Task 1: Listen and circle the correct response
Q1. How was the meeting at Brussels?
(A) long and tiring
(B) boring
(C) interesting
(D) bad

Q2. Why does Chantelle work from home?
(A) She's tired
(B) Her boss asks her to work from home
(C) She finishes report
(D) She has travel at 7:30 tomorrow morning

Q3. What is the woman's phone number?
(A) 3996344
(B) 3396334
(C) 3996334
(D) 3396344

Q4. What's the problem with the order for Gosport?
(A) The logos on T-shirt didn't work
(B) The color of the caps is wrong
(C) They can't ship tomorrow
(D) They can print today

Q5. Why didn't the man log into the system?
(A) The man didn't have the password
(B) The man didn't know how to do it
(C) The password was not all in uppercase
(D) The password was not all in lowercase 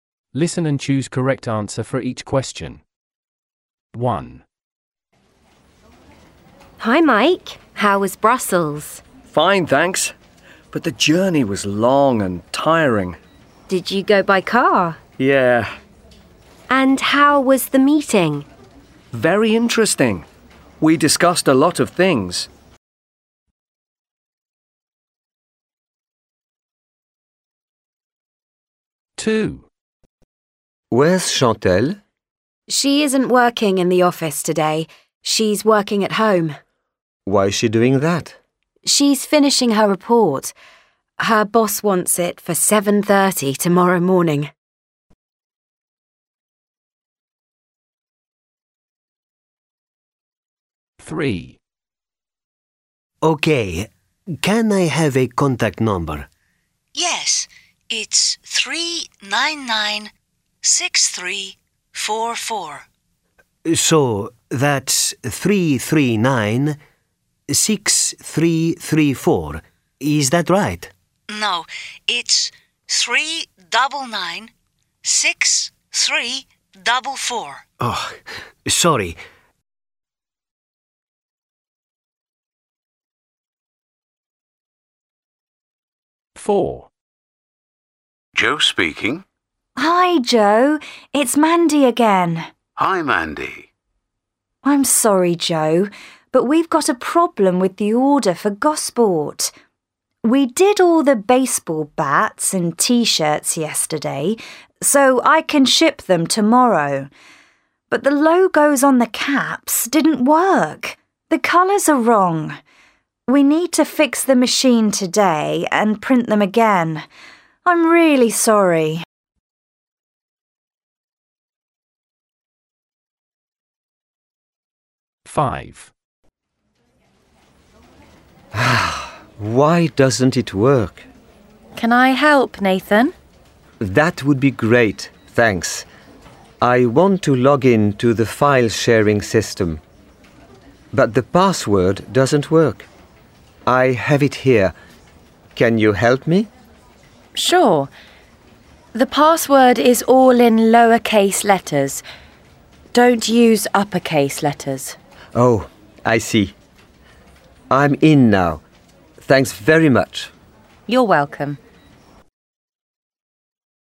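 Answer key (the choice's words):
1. interesting
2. She finishes report
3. 3996344
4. The color of the caps is wrong
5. The password was not all in lowercase

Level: A1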